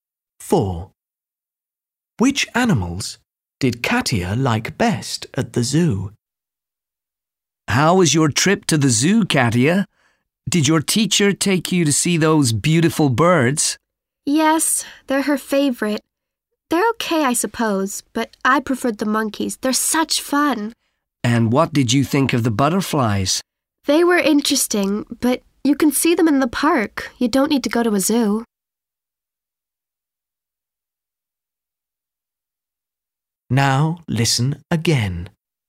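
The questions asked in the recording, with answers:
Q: Which animals did Katia like best at the zoo?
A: the monkeys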